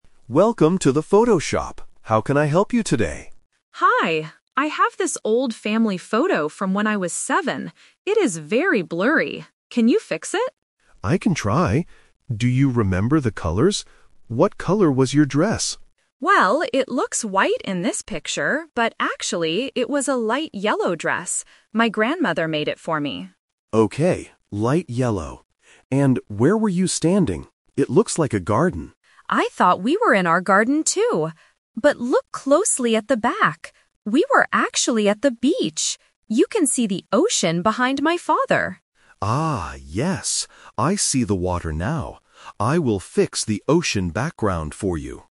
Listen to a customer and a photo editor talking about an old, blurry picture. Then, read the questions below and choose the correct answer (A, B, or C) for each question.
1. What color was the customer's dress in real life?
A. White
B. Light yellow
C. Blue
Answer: B

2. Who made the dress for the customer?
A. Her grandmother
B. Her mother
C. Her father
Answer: A

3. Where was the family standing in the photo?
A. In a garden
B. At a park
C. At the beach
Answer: C

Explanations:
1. The customer clearly says, "...but actually, it was a light yellow dress." Option (A) is a trap; the dress looks white in the blurry photo, but that was not its real color. Option (C) is a common color but is never mentioned in the audio.
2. The customer states, "My grandmother made it for me." Option (B) is a plausible guess for who makes clothes, but it is not mentioned. Option (C) is a trap; her father is mentioned later in the audio (standing in front of the ocean), but he didn't make the dress.
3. The customer explains the twist by saying, "We were actually at the beach." Option (A) is a trap; the editor guesses it is a garden, and the customer thought so too at first, but it was wrong. Option (B) is a plausible outdoor location but is not mentioned in the conversation.

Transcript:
Editor: Welcome to the photo shop. How can I help you today?
Customer: Hi. I have this old family photo from when I was seven. It is very blurry. Can you fix it?
Editor: I can try. Do you remember the colors? What color was your dress?
Customer: Well, it looks white in this picture, but actually, it was a light yellow dress. My grandmother made it for me.
Editor: Okay, light yellow. And where were you standing? It looks like a garden.
Customer: I thought we were in our garden too! But look closely at the back. We were actually at the beach. You can see the ocean behind my father.
Editor: Ah, yes. I see the water now. I will fix the ocean background for you.

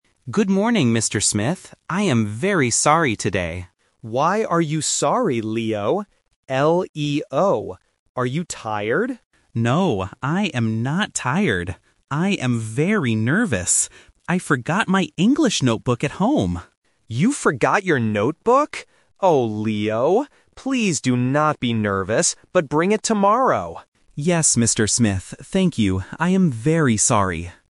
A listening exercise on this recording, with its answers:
Listen to the conversation and choose the correct answer for each question.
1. What is the student's name?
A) Leon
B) Leo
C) Lee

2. How does the student feel today?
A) Tired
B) Happy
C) Nervous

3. What did the student forget at home?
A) A notebook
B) A book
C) A pen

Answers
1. B
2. C
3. A

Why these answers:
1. The correct answer is (B). The teacher spells the student's name clearly: "L-E-O." Options (A) "Leon" and (C) "Lee" are sound traps because they sound very similar to the correct name.
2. The correct answer is (C). The student explicitly says, "I am very nervous." Option (A) "Tired" is the trap; the teacher asks if he is tired, but the student rejects it ("No, I am not tired"). Option (B) "Happy" is not mentioned and does not fit the context.
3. The correct answer is (A). The student says, "I forgot my English notebook at home," and the teacher repeats, "You forgot your notebook?" Option (B) "A book" is a trap because it sounds similar and is related to studying. Option (C) "A pen" is a plausible school item but is never mentioned.

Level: A1

